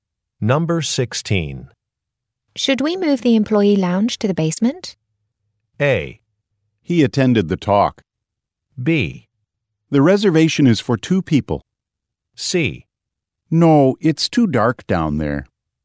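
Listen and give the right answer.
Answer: C: No, it's too dark down there.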